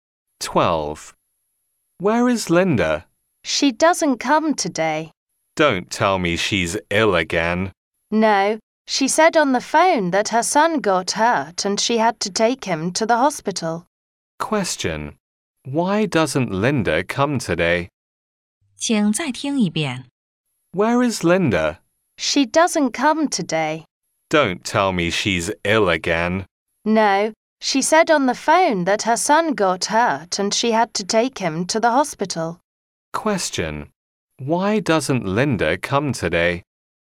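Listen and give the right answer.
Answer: Her son got hurt and she had to take him to the hospital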